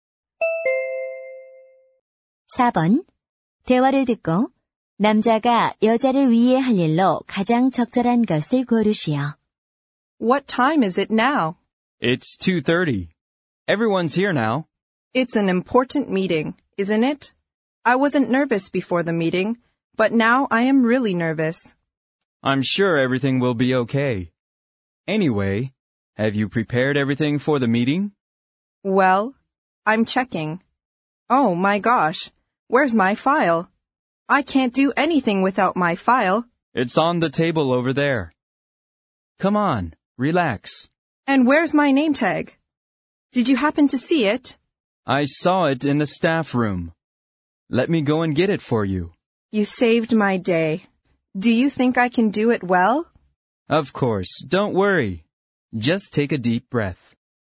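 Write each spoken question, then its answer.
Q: 대화를 듣고 남자가 여자를 위해 할 일로 가장 적절한 것을 고르시오.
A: 직원실에서 명찰 가져오기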